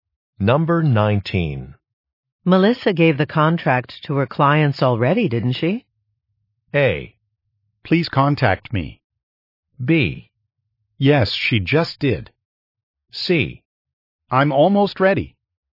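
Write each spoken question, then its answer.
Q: Melissa gave the contract to her clients already, didn't she?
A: B: Yes, she just did.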